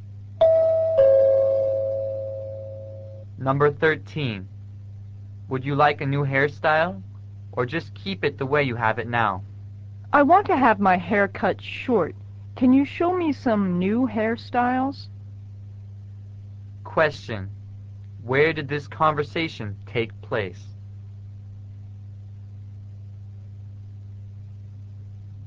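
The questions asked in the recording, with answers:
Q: Where did this conversation take place?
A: At a hairdresser's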